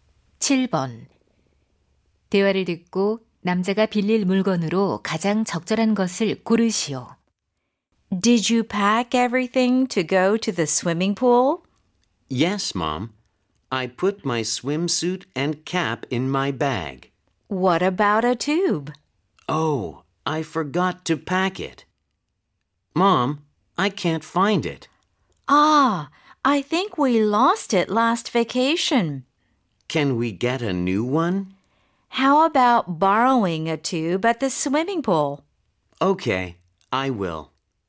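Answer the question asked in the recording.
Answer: 튜브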